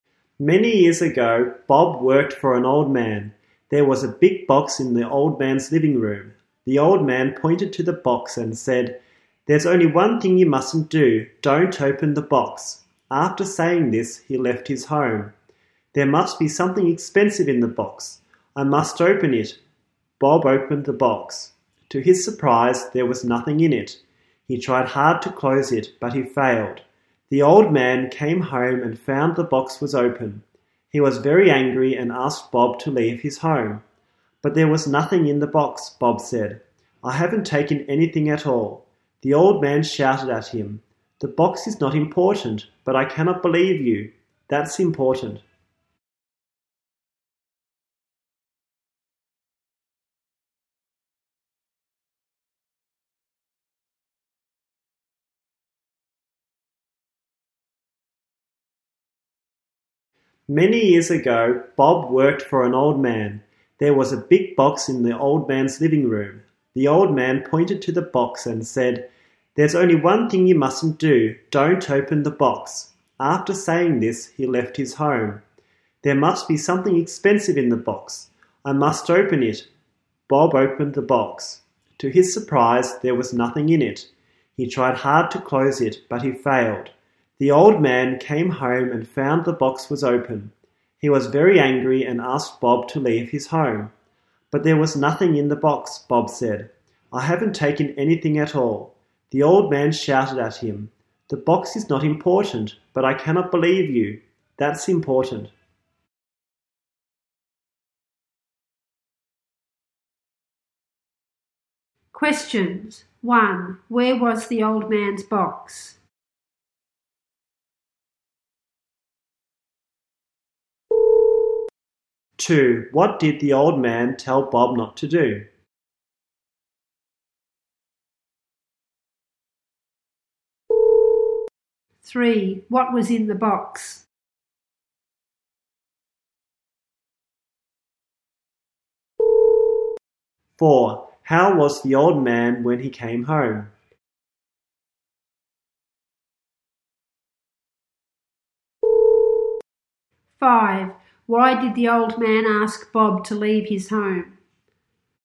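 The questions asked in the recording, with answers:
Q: Where was the old man's box?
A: In his living room

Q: What did the old man tell Bob not to do?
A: Open the box

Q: What was in the box?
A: Nothing

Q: How was the old man when he came home?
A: Very angry

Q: Why did the old man ask Bob to leave his home?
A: He could not believe (trust) Bob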